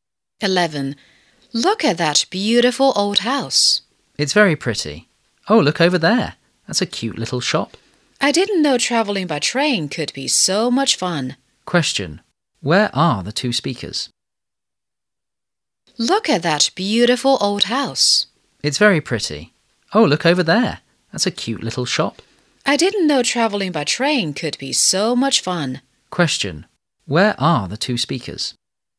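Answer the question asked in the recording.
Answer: On a train.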